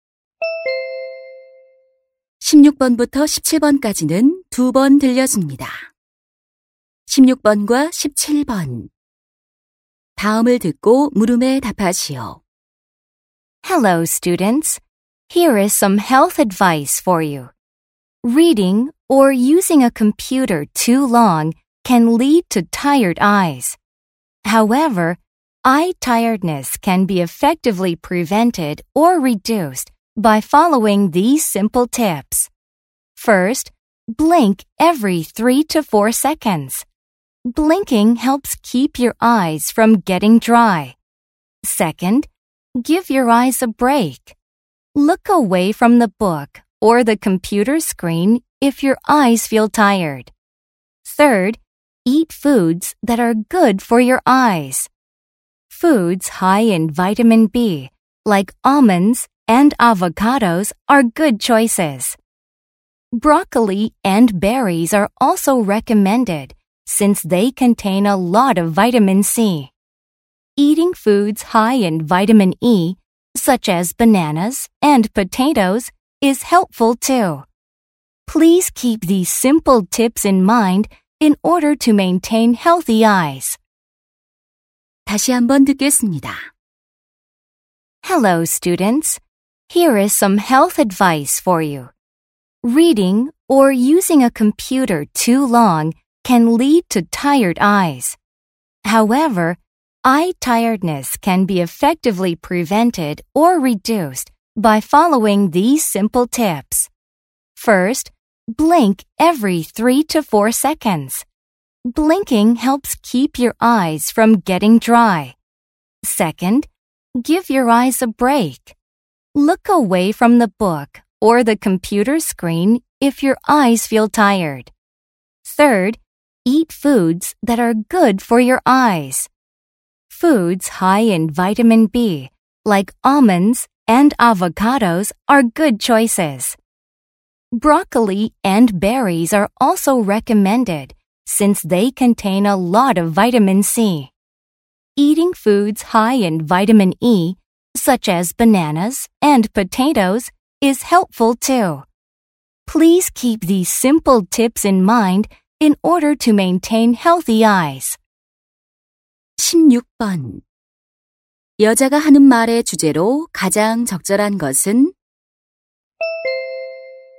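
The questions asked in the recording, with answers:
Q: 여자가 하는 말의 주제로 가장 적절한 것은?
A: 눈의 피로를 예방하거나 줄이는 방법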